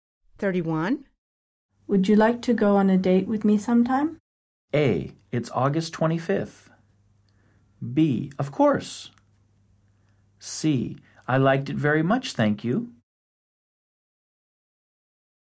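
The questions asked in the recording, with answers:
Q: Would you like to go on a date with me sometime?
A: B: Of course.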